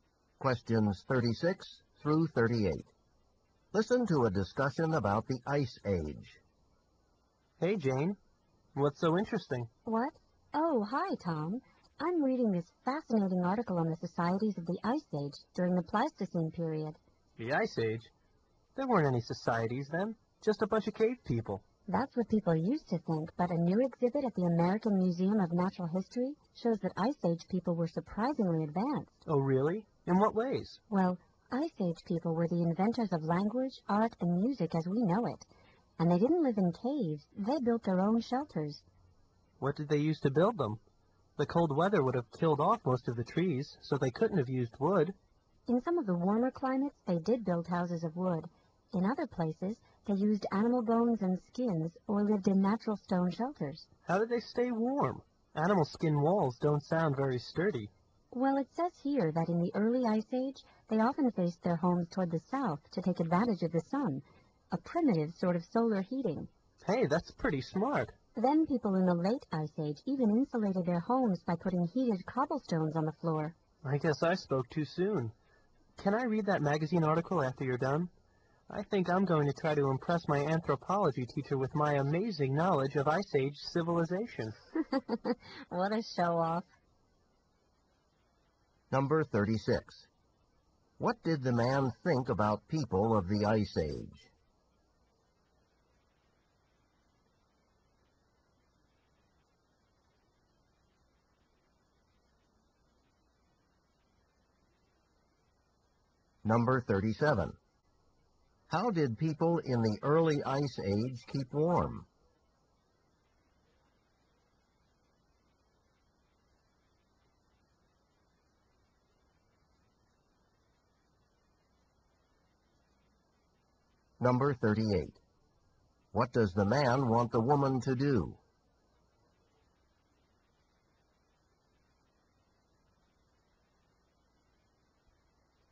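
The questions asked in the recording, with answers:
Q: What did the man think about people of the Ice Age?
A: They were just cave people without societies

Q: How did people in the early Ice Age keep warm?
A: They faced their homes south toward the sun

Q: What does the man want the woman to do?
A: Let him read the magazine article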